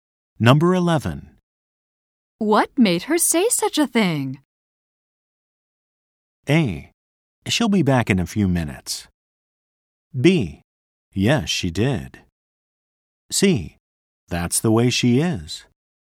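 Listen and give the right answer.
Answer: C: That's the way she is.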